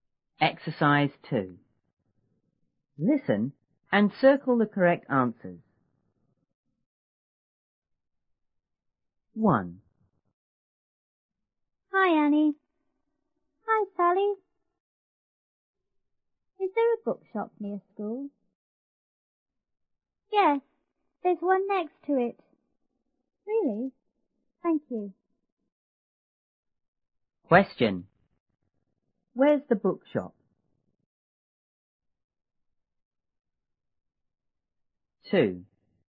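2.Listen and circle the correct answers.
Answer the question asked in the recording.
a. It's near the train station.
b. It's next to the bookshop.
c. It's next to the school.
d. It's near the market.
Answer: c. It's next to the school.

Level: 初中英语广州版1B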